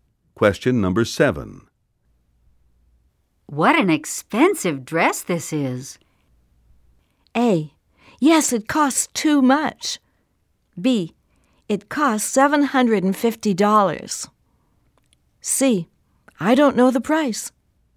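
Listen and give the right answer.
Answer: A: Yes, it costs too much.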